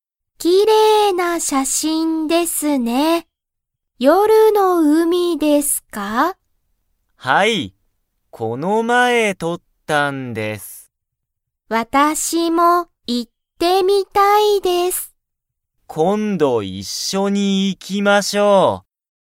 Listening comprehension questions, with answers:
田中(たなか)さんは、夜(よる)の海(うみ)に行(い)きたいですか?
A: はい

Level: Level 1